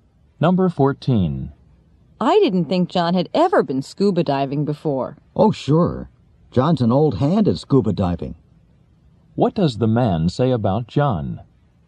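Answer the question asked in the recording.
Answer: John is experienced at scuba diving.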